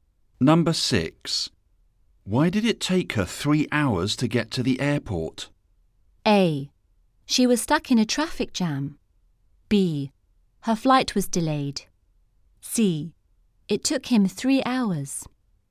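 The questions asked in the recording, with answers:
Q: Why did it take her 3 hours to get to the airport?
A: A: She was stuck in a traffic jam.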